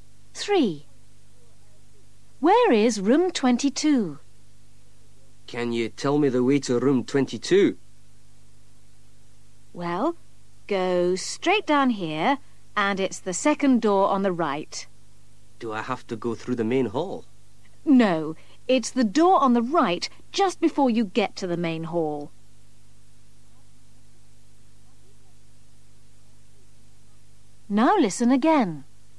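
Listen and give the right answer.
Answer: second door on the right, just before the main hall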